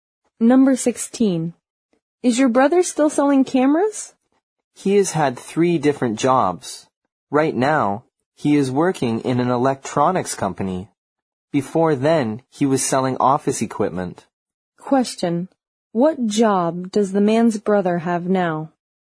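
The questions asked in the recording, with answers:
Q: What job does the man's brother have now?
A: He works in an electronics company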